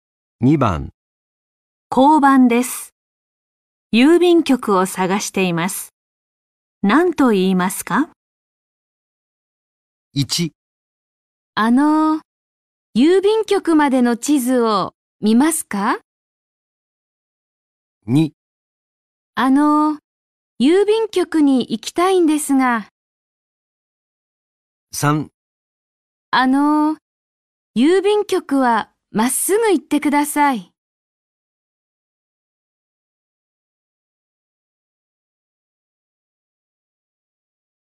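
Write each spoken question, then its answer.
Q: 交番です。郵便局を探しています。何と言いますか?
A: 2: 郵便局に行きたいんですが。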